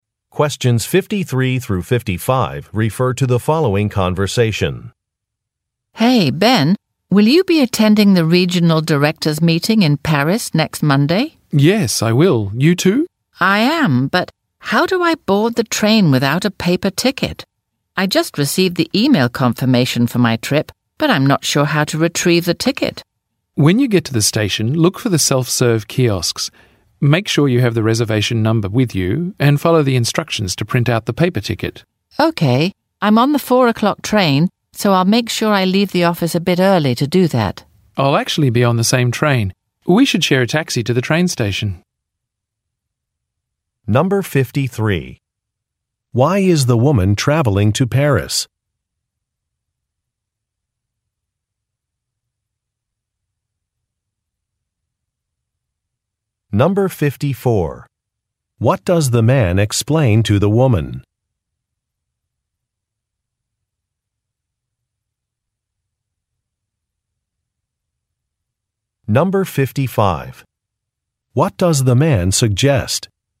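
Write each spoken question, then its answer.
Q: Why is the woman traveling to Paris?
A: To attend the regional directors meeting

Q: What does the man explain to the woman?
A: How to get a paper ticket: use the self-serve kiosks at the station with the reservation number

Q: What does the man suggest?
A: Sharing a taxi to the train station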